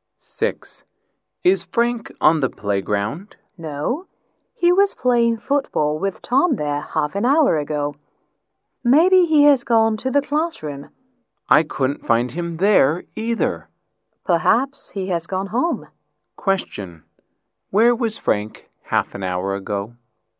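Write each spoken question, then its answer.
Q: Where was Frank half an hour ago?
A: On the playground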